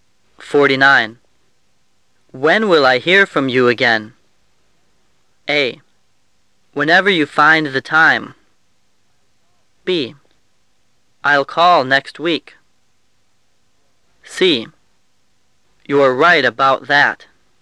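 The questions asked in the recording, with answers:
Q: When will I hear from you again?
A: B: I'll call next week.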